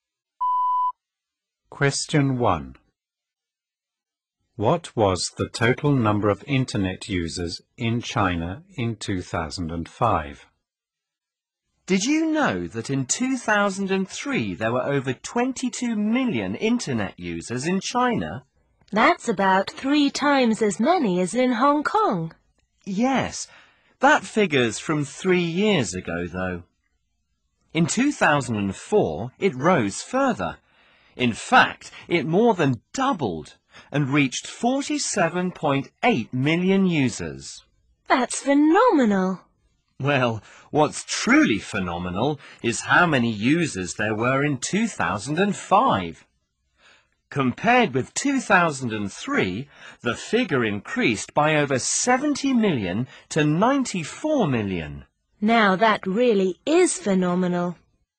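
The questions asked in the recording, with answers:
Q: What was the total number of internet users in China in 2005?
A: 94 million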